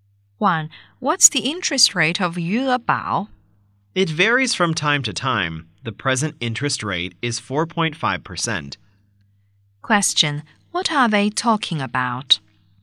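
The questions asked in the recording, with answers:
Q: What are they talking about?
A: The interest rate of Yuebao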